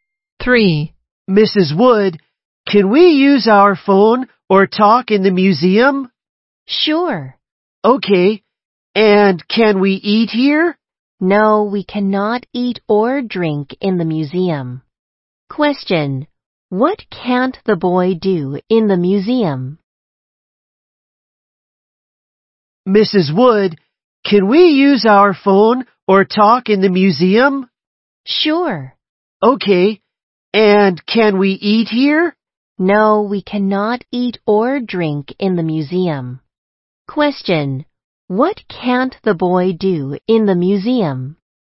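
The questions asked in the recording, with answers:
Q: What can't the boy do in the museum?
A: Eat or drink.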